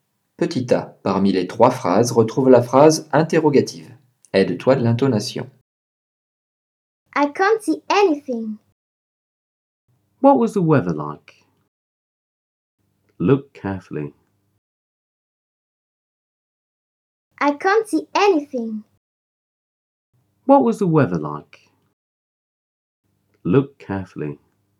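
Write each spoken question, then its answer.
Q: parmi les 3 phrases, retrouve la phrase interrogative.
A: What was the weather like?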